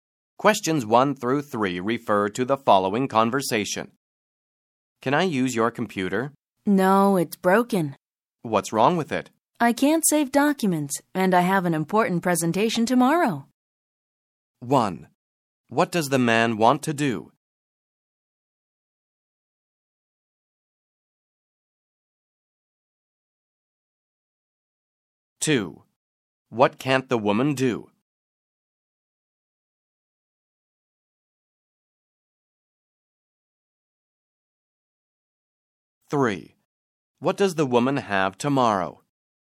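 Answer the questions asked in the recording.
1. Use the woman's computer
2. Save documents
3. An important presentation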